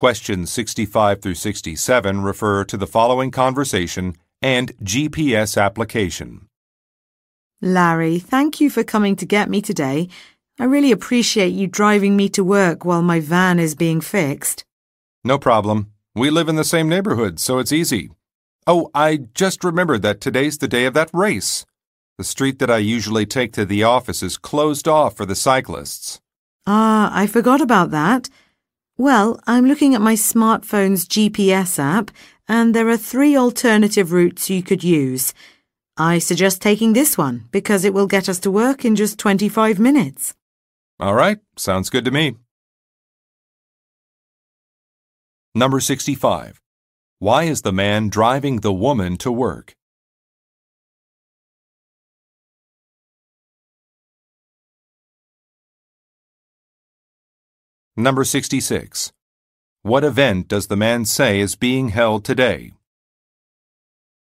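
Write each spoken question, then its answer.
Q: Why is the man driving the woman to work?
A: Her van is being repaired.

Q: What event does the man say is being held today?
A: A bicycle race.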